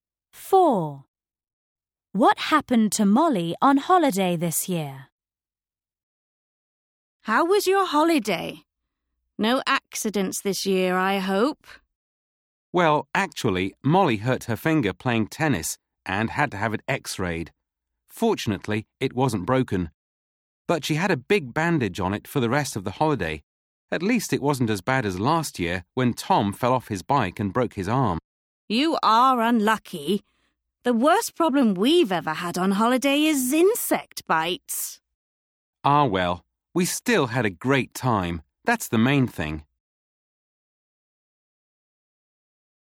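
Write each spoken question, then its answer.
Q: What happened to Molly on holiday this year?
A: She hurt her finger playing tennis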